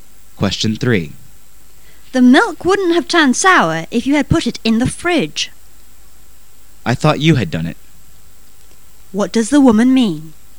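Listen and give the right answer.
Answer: She thought the man had put the milk in the fridge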